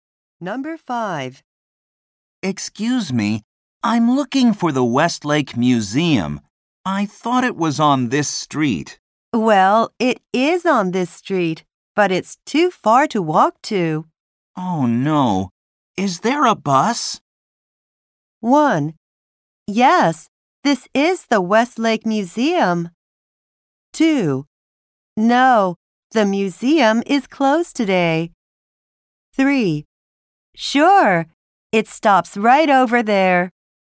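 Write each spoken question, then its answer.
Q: Oh, no. Is there a bus?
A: 3: Sure, it stops right over there.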